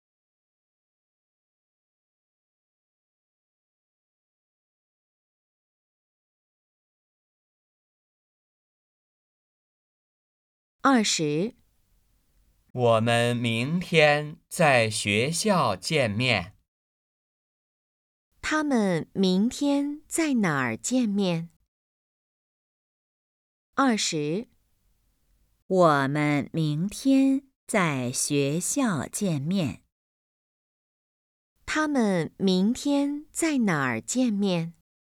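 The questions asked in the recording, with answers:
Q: 他们明天在哪儿见面?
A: 学校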